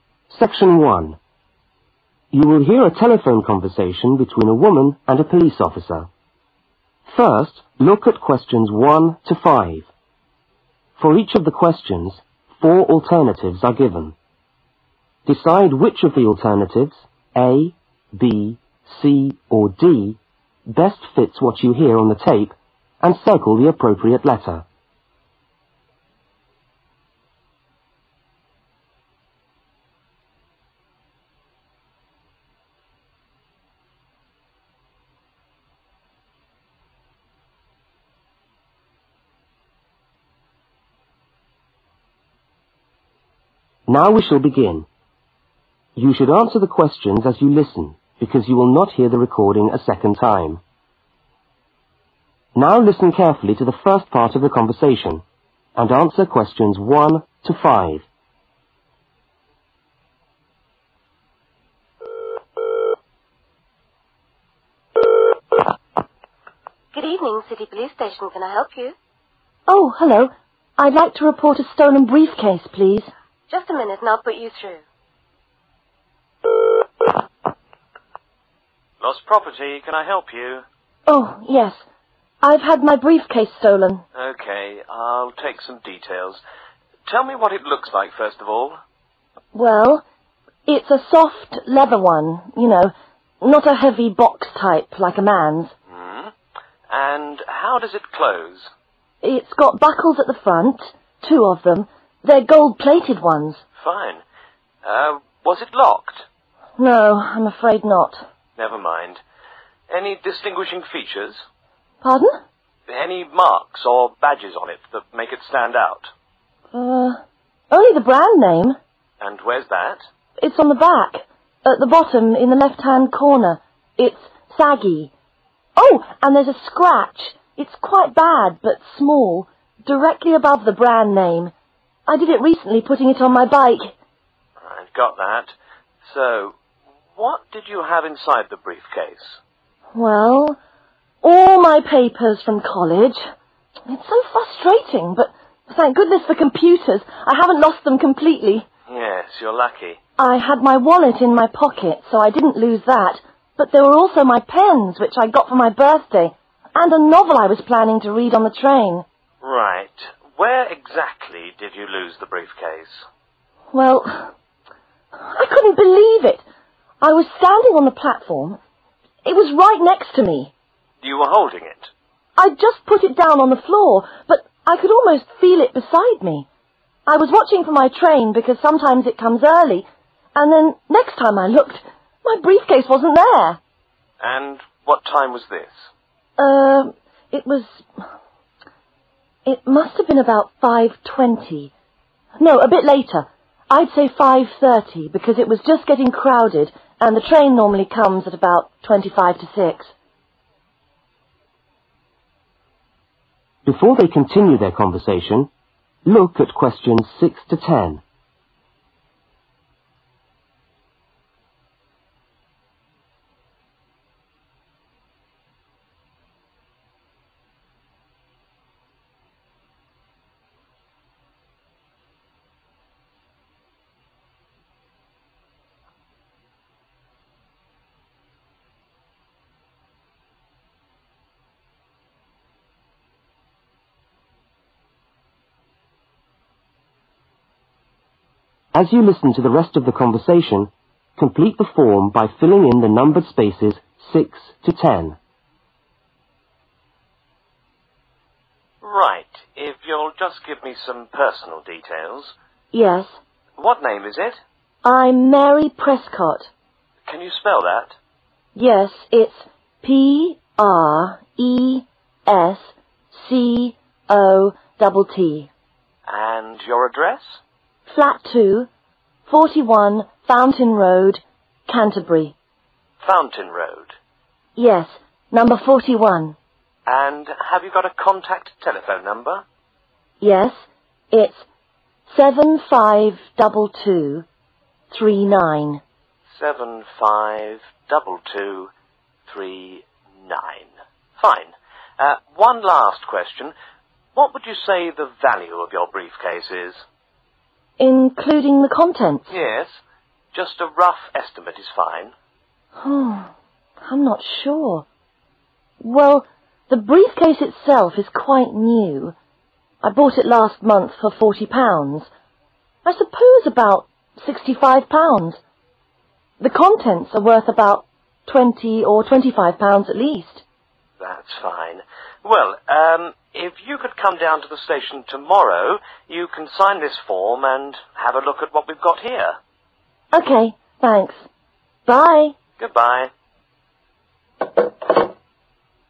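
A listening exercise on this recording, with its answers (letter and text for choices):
Circle the appropriate letter.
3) What did she have inside her briefcase?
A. wallet, pens and novel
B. papers and wallet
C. pens and novel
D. papers, pen and novel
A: D. papers, pen and novel

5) What time was it when she lost her briefcase?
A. 5.20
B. 5.25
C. 5.30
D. 5.55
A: C. 5.30

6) Name: Mary (6)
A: Prescott

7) Address: Flat 2, (7)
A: 41

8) (8) Road Canterbury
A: Fountain

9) Telephone: (9)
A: 752239

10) Estimated value of lost item: (10) £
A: 65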